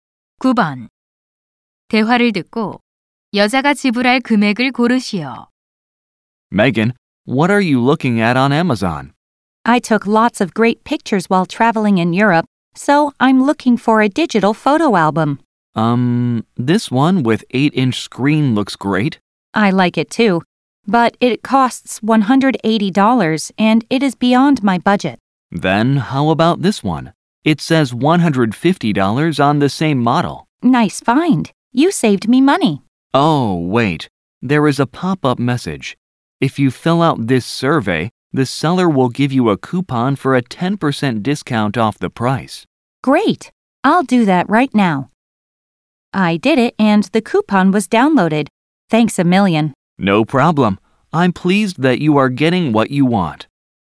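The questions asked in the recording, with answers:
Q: 대화를 듣고 여자가 지불할 금액을 고르시오.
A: $135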